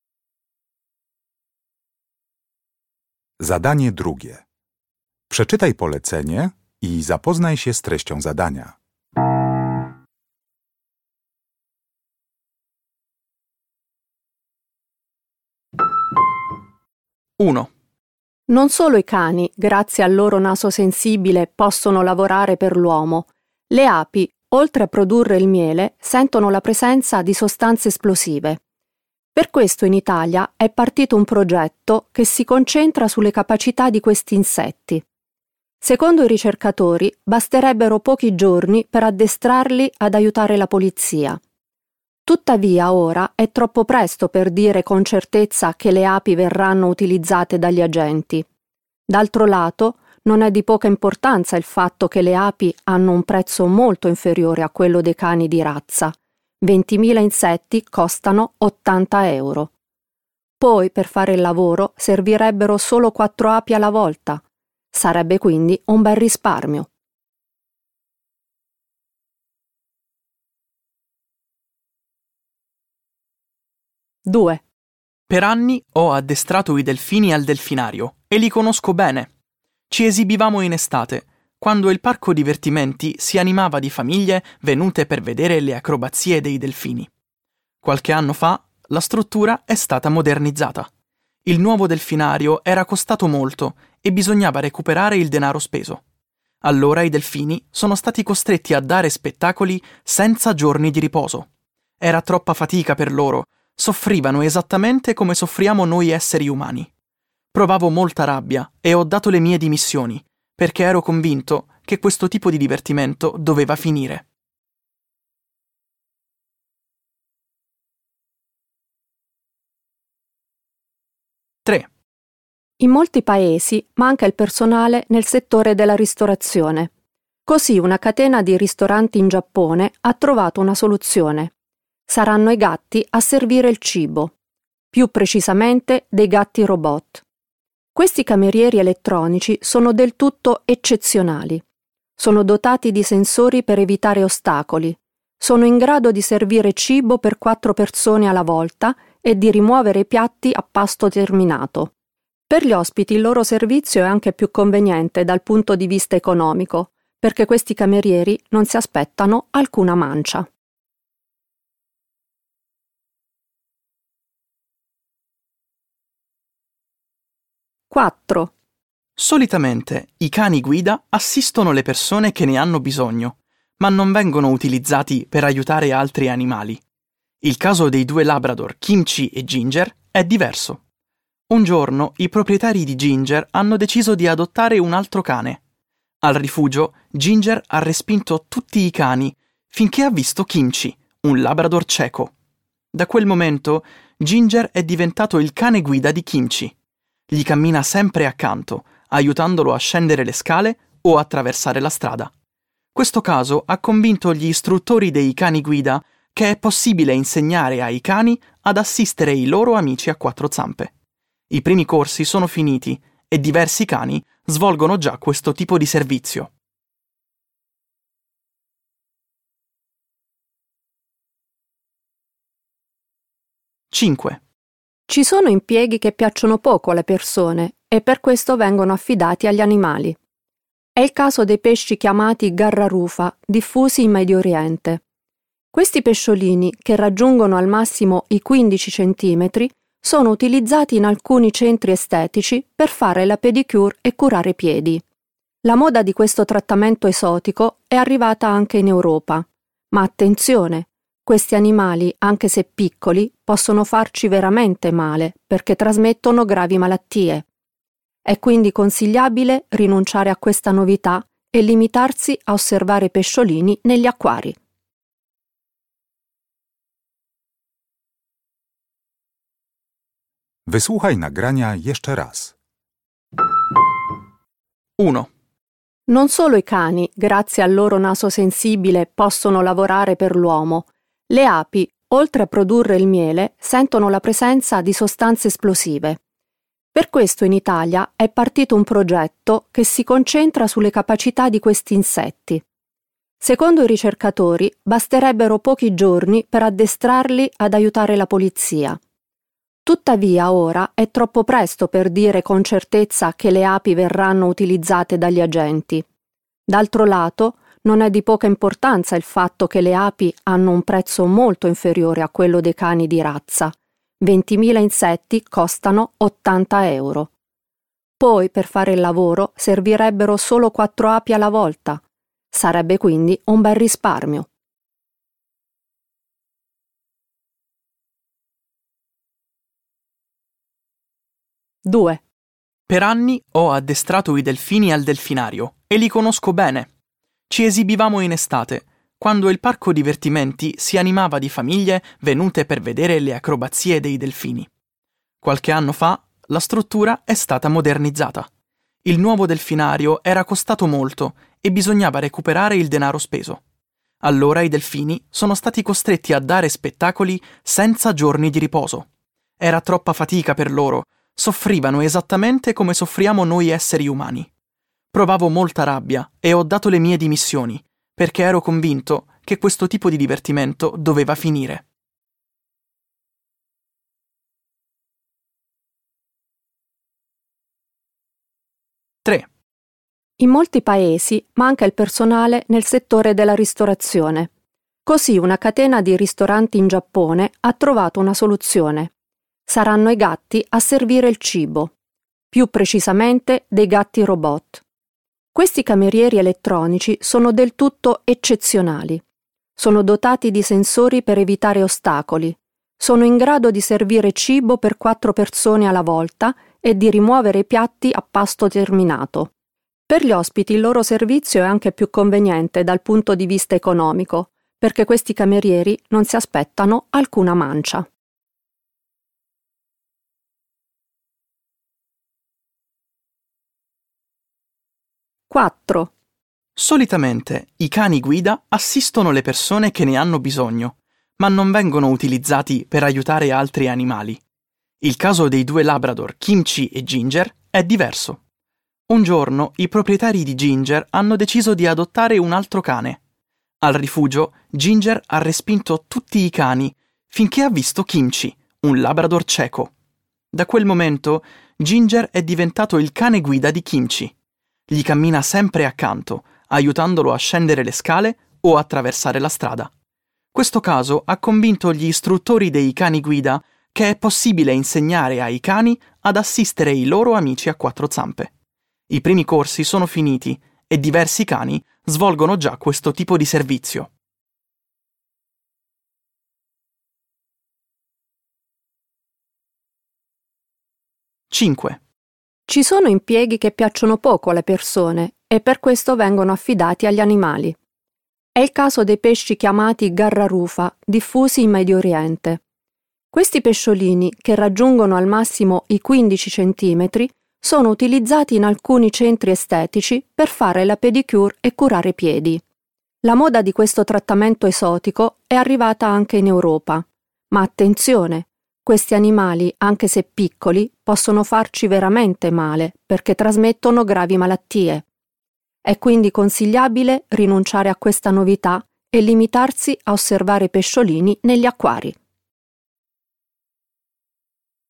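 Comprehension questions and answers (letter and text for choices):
Uruchamiając odtwarzacz z oryginalnym nagraniem CKE usłyszysz dwukrotnie pięć wypowiedzi związanych z pracą zwierząt. Do każdej wypowiedzi (2.1.–2.5.) dopasuj odpowiadające jej pytanie (A–F).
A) gli animali reagiscono al lavoro eccessivo come le persone?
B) l'animale che lavora per l'uomo dovrebbe ricevere uno stipendio?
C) è meglio evitare un servizio perché può essere pericoloso per la salute?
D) l'introduzione di una nuova invenzione tecnologica permette di risparmiare?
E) non si sa ancora se gli animali di cui si parla potranno svolgere il loro servizio?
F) sono stati organizzati addestramenti ispirati dal comportamento di un animale?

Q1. 2.1.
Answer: E) non si sa ancora se gli animali di cui si parla potranno svolgere il loro servizio?

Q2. 2.2.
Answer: A) gli animali reagiscono al lavoro eccessivo come le persone?

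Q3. 2.3.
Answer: D) l'introduzione di una nuova invenzione tecnologica permette di risparmiare?

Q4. 2.4.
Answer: F) sono stati organizzati addestramenti ispirati dal comportamento di un animale?

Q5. 2.5.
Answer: C) è meglio evitare un servizio perché può essere pericoloso per la salute?

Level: Poziom: rozszerzony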